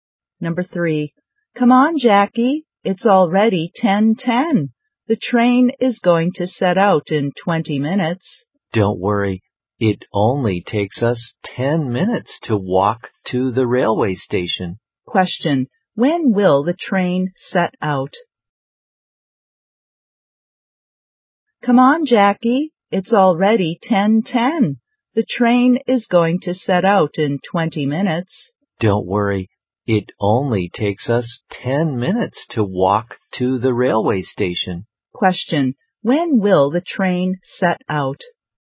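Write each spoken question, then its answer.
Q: When will the train set out?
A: At 10:30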